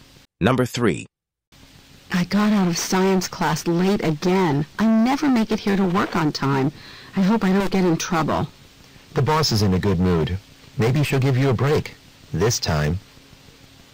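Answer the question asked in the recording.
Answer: She may not punish the woman for being late this time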